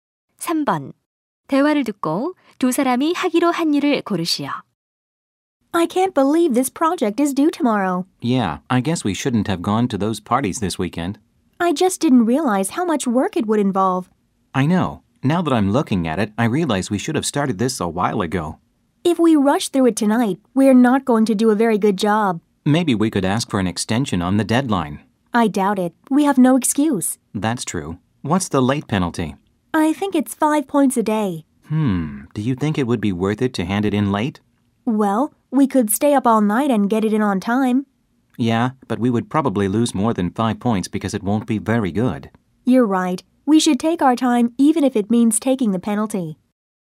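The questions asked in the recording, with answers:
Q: 대화를 듣고 두 사람이 하기로 한 일을 고르시오.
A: 감점을 감수하고 과제를 늦게 제출하기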